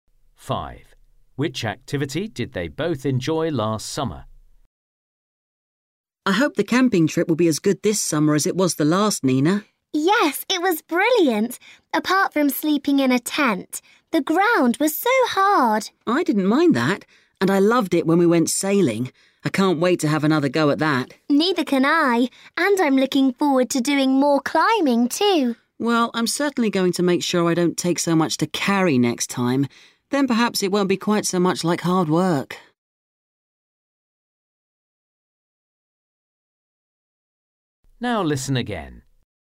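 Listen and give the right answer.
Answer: sailing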